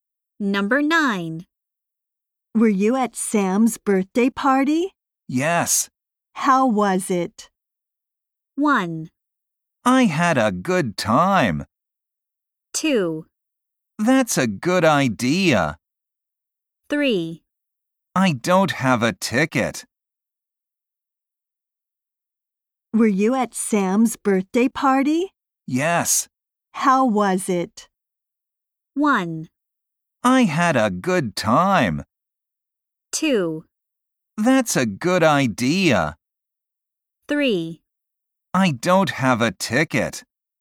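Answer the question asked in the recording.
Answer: 1: I had a good time.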